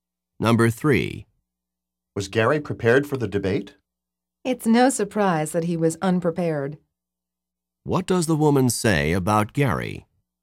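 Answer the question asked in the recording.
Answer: He was unprepared, as expected.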